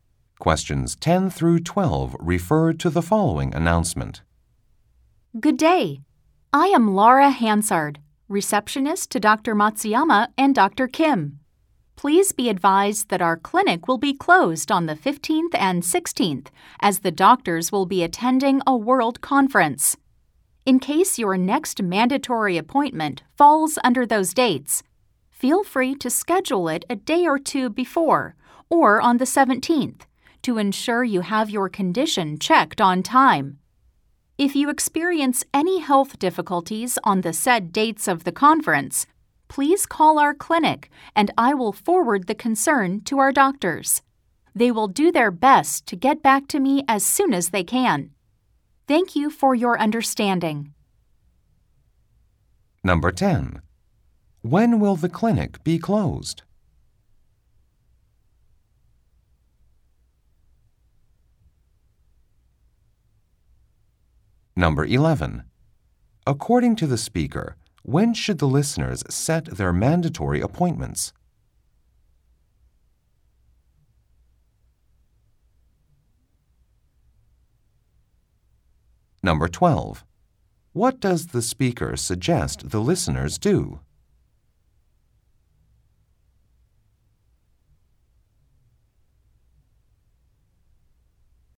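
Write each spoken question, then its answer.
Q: When will the clinic be closed?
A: On the 15th and 16th

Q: According to the speaker, when should the listeners set their mandatory appointments?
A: A day or two before the 15th, or on the 17th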